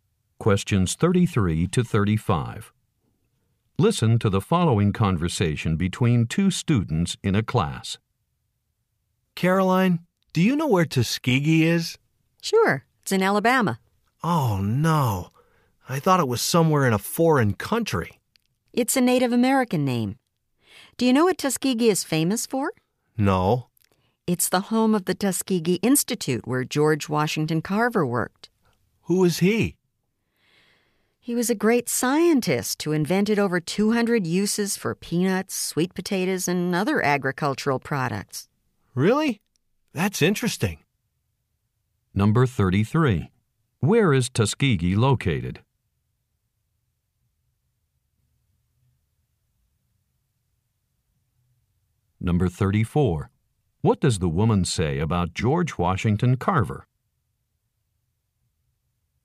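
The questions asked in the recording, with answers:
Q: Where is Tuskegee located?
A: In Alabama

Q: What does the woman say about George Washington Carver?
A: He was a great scientist who invented over 200 uses for peanuts, sweet potatoes and other farm products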